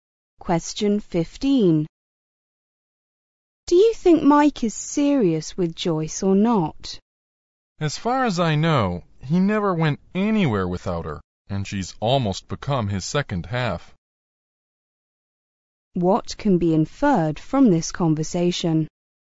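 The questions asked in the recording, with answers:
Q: What can be inferred from this conversation?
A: Mike is serious about Joyce; they are very close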